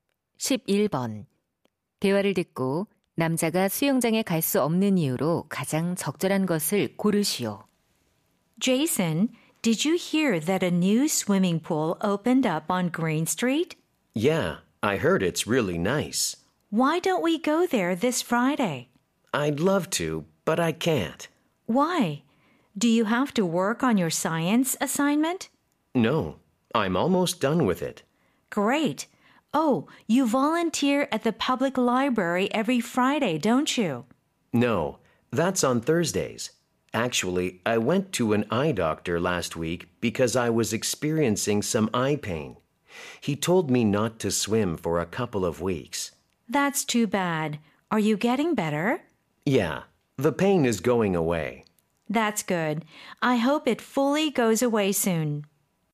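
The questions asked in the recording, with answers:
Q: 대화를 듣고 남자가 수영장에 갈 수 없는 이유로 가장 적절한 것을 고르시오.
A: 눈 통증 때문에 의사가 수영을 하지 말라고 해서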